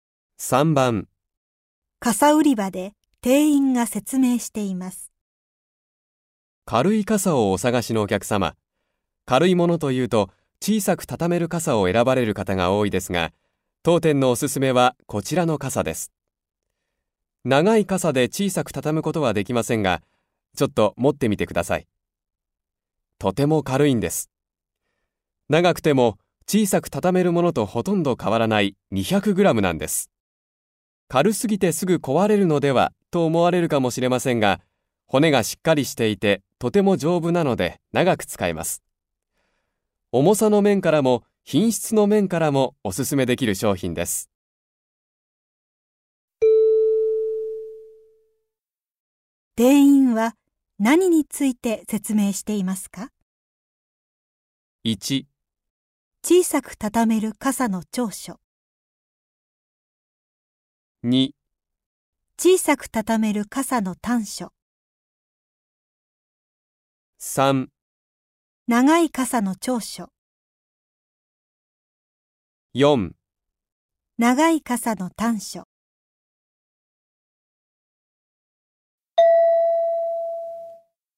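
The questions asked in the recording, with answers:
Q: 店員は何について説明していますか?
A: 3: 長い傘の長所。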